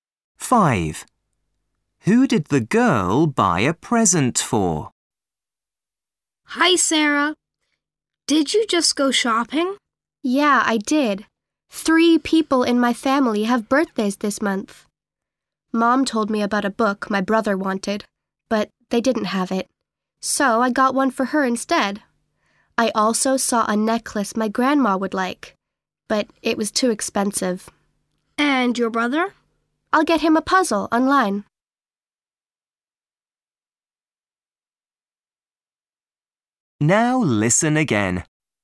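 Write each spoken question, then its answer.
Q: Who did the girl buy a present for?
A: her mother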